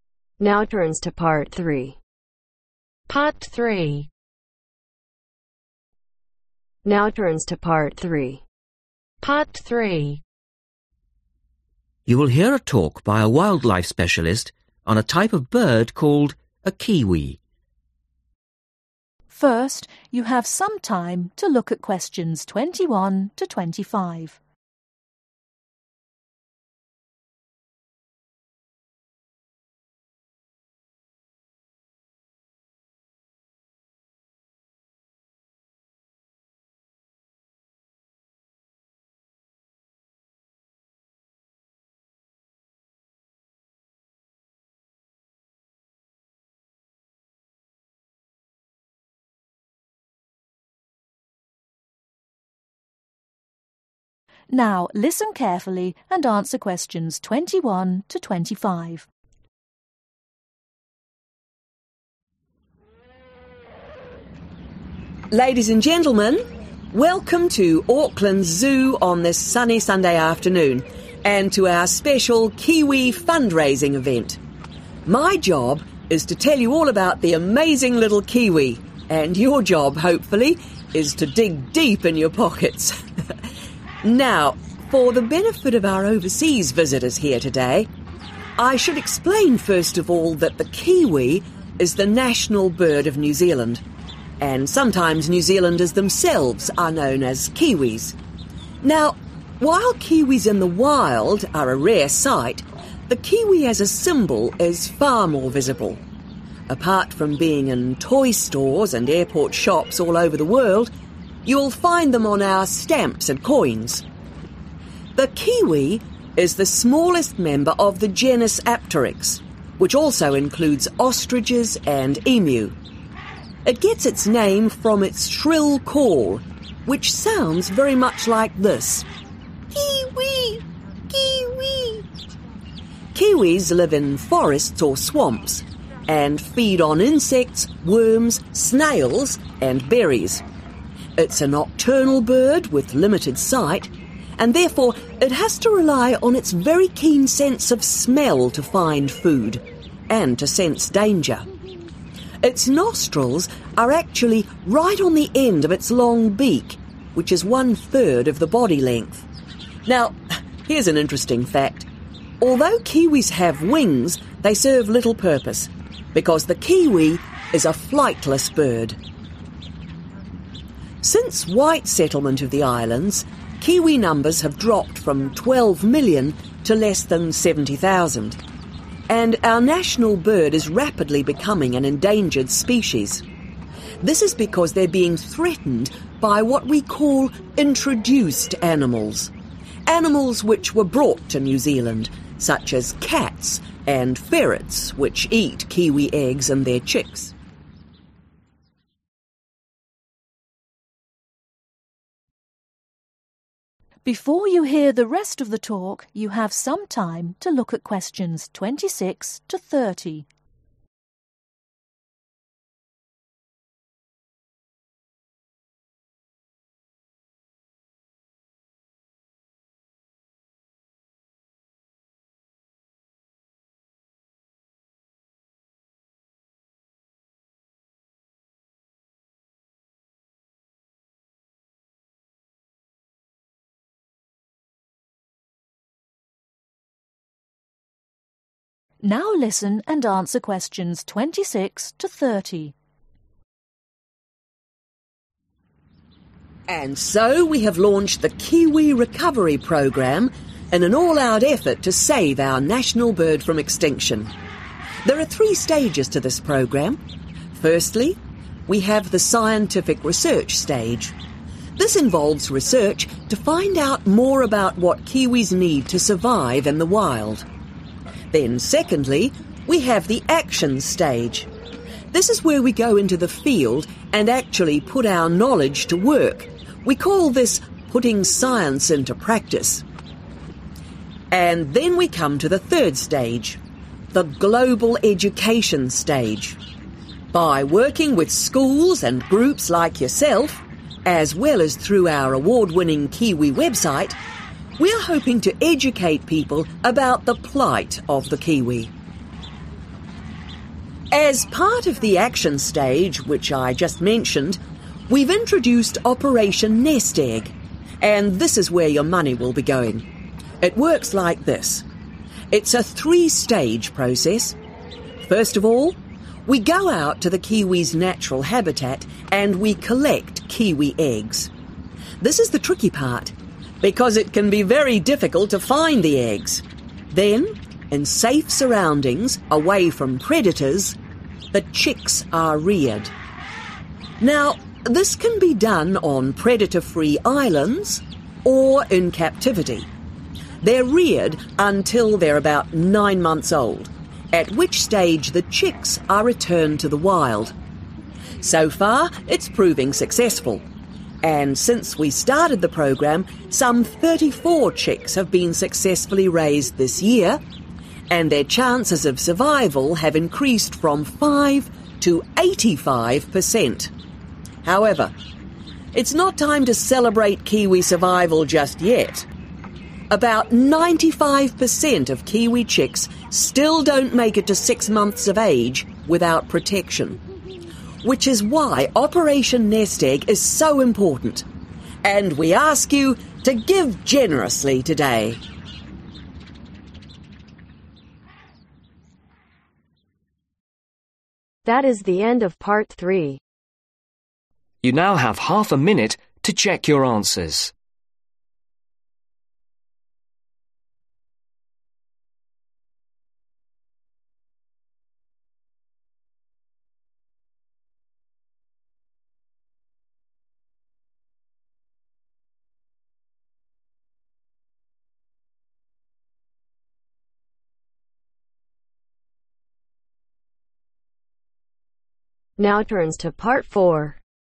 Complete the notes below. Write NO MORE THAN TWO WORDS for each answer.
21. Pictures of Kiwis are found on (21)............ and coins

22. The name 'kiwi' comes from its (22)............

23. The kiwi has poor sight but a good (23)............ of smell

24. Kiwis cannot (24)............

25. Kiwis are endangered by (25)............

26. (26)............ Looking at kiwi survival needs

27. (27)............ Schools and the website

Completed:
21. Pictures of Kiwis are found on Stamps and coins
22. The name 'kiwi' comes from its (Shrill) call
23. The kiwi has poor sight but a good Sense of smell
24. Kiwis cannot Fly
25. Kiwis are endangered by Introduced animals
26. (Scientific) research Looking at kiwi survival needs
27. Global education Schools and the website